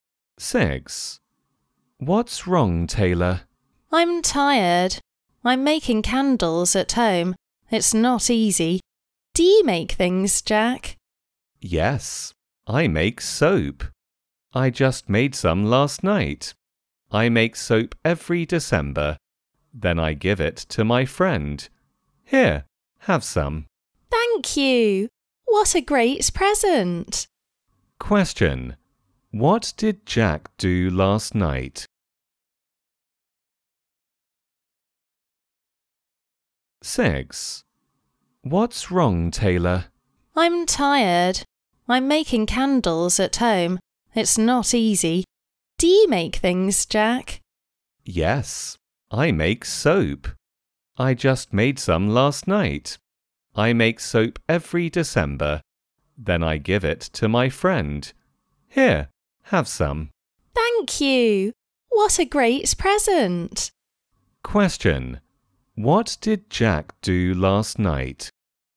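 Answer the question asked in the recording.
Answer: He made soap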